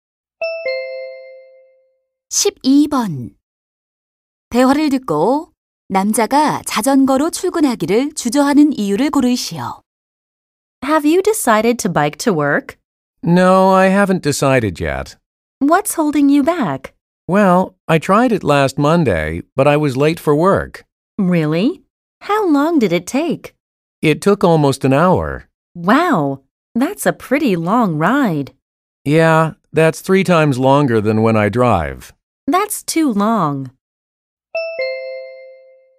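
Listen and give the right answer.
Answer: 시간이 너무 오래 걸려서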